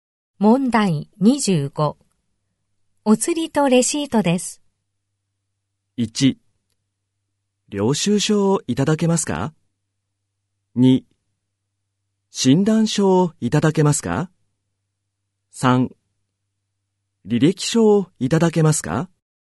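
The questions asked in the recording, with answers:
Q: お釣りとレシートです。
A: 1: 領収書をいただけますか。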